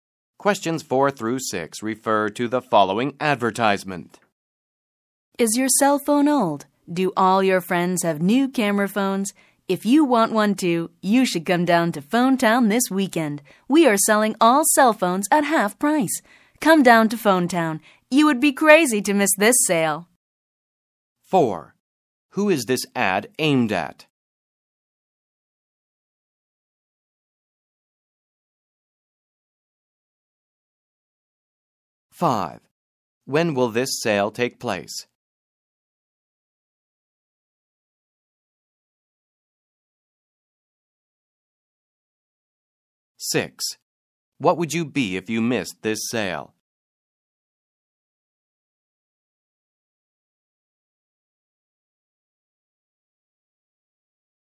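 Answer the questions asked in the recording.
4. People with old cell phones
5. This weekend
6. Crazy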